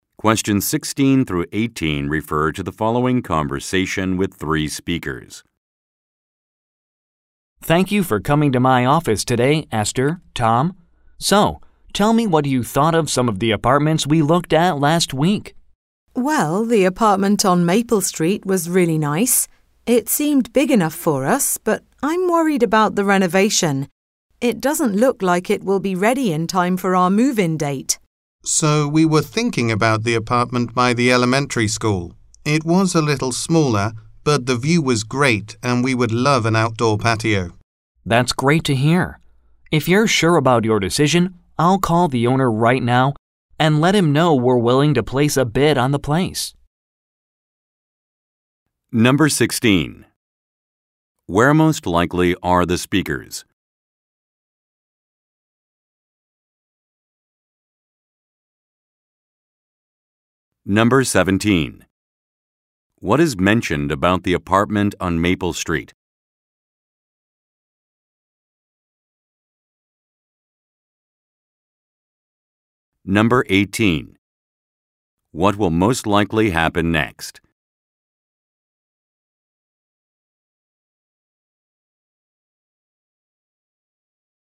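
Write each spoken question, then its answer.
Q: Where most likely are the speakers?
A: In a real estate agent's office

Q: What is mentioned about the apartment on Maple Street?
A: Its renovation may not be finished by the move-in date

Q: What will most likely happen next?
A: The agent will call the owner to place a bid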